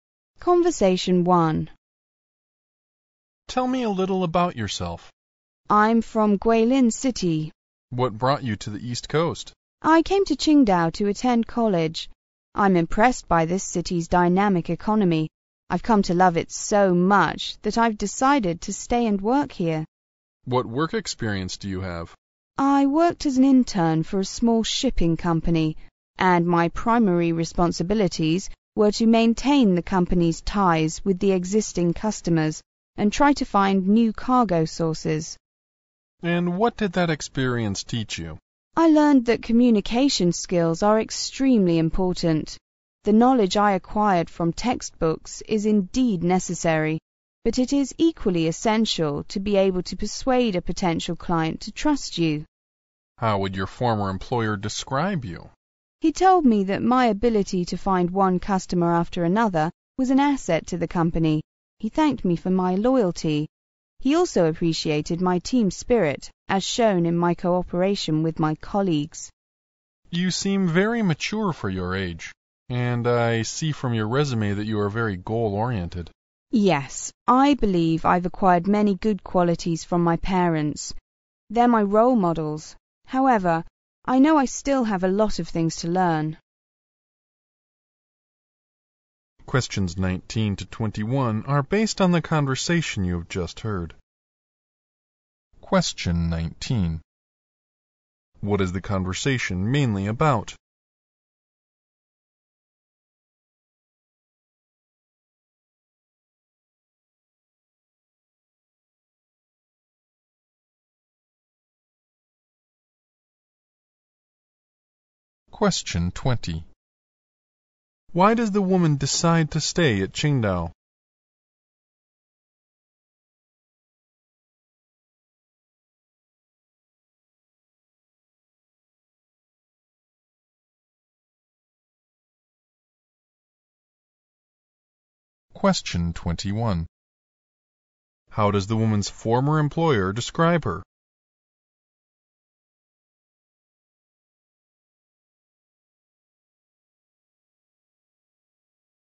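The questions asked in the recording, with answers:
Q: What is the conversation mainly about?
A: A job interview

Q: Why does the woman decide to stay at Qingdao?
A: She is impressed by its dynamic economy and has come to love the city

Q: How does the woman's former employer describe her?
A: Good at finding customers, loyal, with team spirit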